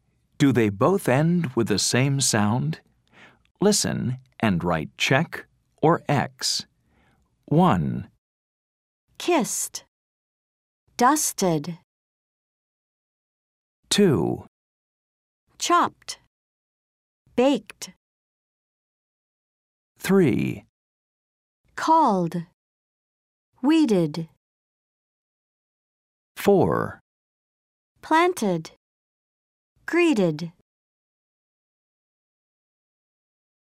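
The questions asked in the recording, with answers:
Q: Do they both end with the same sound?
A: No (X): kissed ends in /t/, dusted in /ɪd/

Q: Do they both end with the same sound?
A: Yes (check): both end in /t/

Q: Do they both end with the same sound?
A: No (X): called ends in /d/, weeded in /ɪd/

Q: Do they both end with the same sound?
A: Yes (check): both end in /ɪd/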